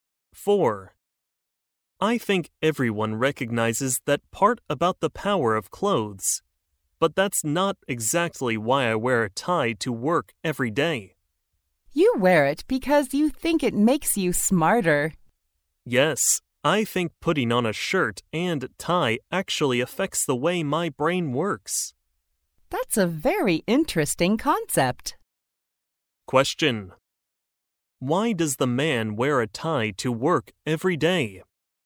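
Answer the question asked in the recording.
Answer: He thinks it makes him smarter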